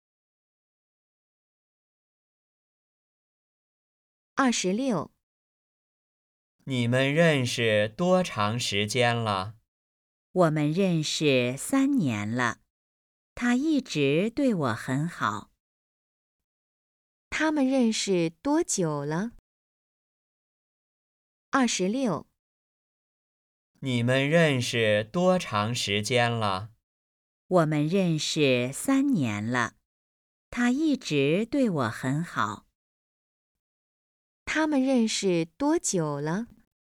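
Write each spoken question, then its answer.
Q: 他们认识多久了?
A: 3年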